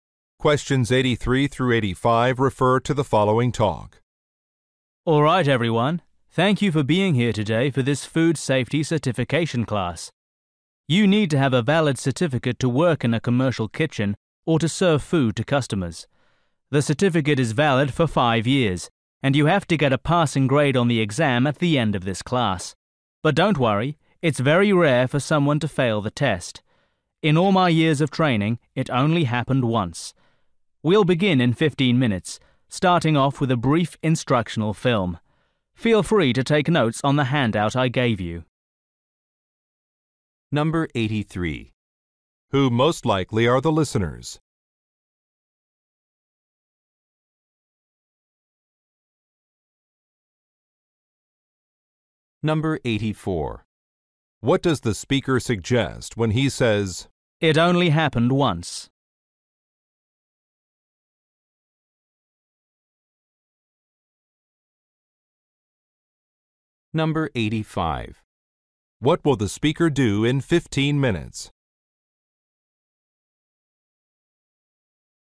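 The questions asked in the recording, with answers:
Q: Who most likely are the listeners?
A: Food service workers seeking certification

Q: What does the speaker suggest when he says, "It only happened once"?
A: The exam is easy to pass

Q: What will the speaker do in 15 minutes?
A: Show an instructional film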